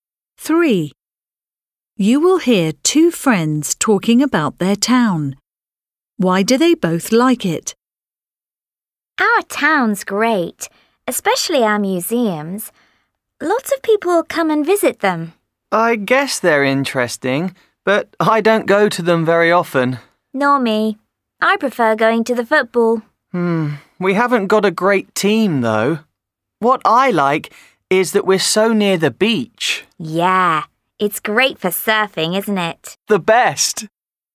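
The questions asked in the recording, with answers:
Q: Why do they both like it?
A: It's near the beach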